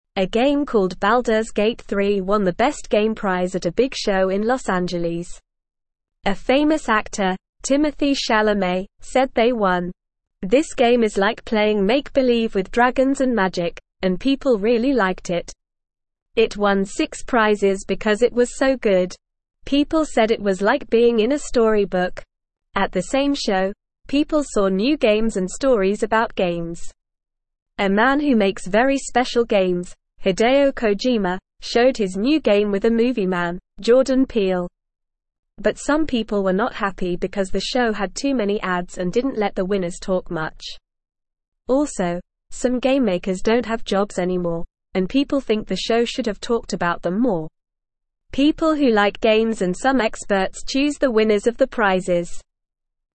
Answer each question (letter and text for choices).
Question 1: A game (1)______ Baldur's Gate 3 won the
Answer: called

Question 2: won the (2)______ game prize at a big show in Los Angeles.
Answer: best

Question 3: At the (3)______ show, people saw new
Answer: same

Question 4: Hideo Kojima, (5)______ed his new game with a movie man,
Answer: show

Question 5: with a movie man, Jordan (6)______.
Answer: Peele

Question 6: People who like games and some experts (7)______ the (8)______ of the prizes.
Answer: choose

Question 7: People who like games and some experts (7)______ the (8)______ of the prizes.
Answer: winners

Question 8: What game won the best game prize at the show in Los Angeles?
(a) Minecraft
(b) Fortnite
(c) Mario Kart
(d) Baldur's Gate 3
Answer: (d) Baldur's Gate 3

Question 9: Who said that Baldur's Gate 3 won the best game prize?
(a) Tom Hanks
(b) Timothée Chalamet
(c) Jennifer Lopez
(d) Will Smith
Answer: (b) Timothée Chalamet

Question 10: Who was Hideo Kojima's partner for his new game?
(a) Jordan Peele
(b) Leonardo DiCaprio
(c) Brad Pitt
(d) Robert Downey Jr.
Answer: (a) Jordan Peele

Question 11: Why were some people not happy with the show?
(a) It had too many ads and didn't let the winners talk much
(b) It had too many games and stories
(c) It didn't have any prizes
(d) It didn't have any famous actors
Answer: (a) It had too many ads and didn't let the winners talk much

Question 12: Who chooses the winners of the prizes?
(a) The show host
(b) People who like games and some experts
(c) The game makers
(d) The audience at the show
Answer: (b) People who like games and some experts

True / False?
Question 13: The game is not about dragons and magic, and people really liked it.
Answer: False

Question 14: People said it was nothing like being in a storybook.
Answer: False

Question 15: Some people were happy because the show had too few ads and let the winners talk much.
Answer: False

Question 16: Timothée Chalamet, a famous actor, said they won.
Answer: True

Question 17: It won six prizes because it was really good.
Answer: True

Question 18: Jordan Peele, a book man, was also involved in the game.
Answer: False

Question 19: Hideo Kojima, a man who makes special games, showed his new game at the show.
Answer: True

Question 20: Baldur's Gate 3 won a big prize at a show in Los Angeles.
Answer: True

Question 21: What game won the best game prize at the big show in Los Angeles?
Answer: Baldur's Gate 3 won the best game prize

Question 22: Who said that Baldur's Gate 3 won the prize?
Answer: A famous actor named Timothée Chalamet

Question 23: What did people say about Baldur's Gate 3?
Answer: Baldur's Gate 3 was like being in a storybook.

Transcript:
A game called Baldur's Gate 3 won the best game prize at a big show in Los Angeles. A famous actor, Timothée Chalamet, said they won. This game is like playing make-believe with dragons and magic, and people really liked it. It won six prizes because it was so good. People said it was like being in a storybook.
At the same show, people saw new games and stories about games. A man who makes very special games, Hideo Kojima, showed his new game with a movie man, Jordan Peele. But some people were not happy because the show had too many ads and didn't let the winners talk much. Also, some game makers don't have jobs anymore, and people think the show should have talked about them more. People who like games and some experts choose the winners of the prizes.

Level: Level 1